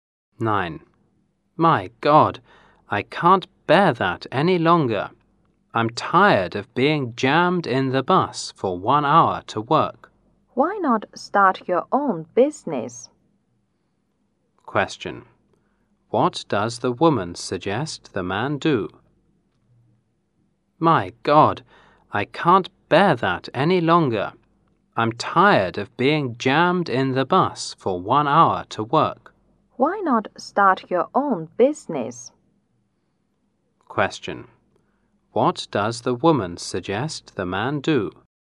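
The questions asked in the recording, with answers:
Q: What does the woman suggest the man do?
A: Start his own business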